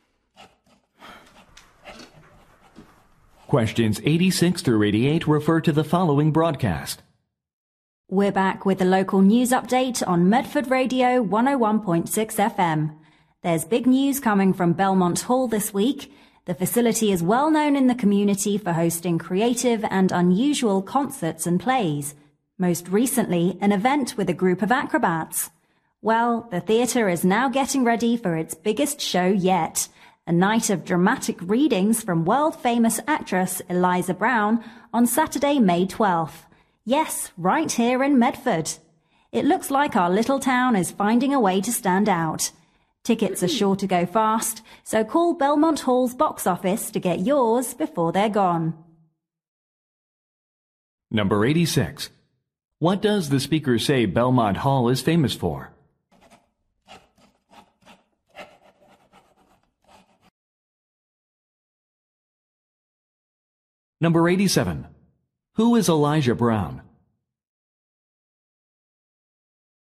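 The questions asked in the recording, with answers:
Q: What does the speaker say Belmont Hall is famous for?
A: Hosting creative and unusual shows

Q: Who is Elijah Brown?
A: A famous actress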